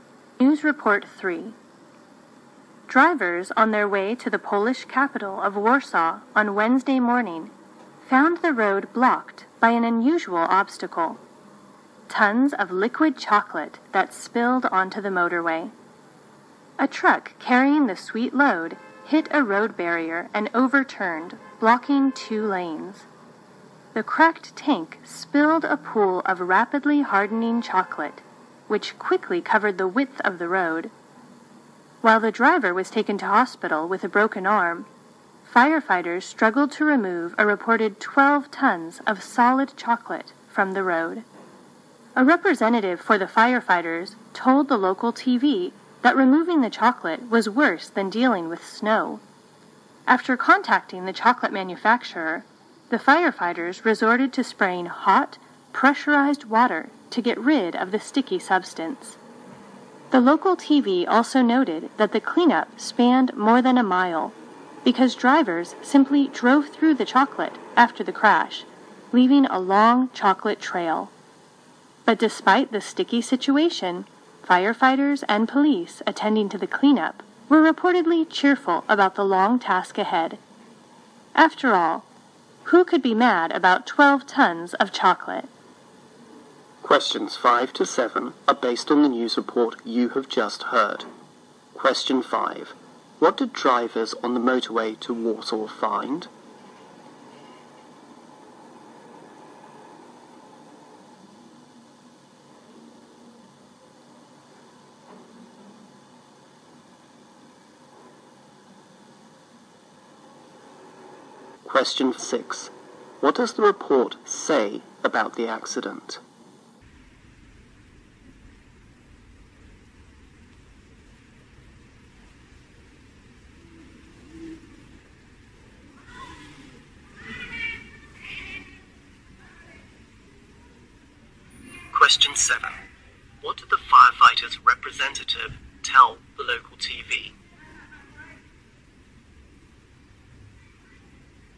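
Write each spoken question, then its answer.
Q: What did drivers on the motorway to Warsaw find?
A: Tons of liquid chocolate spilled on the road

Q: What did the firefighters' representative tell the local TV?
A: Removing the chocolate was worse than dealing with snow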